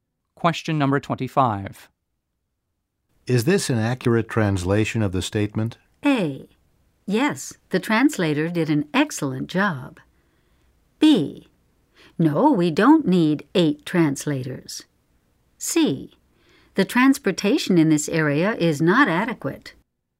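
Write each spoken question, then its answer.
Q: Is this an accurate translation of the statement?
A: A: Yes, the translator did an excellent job.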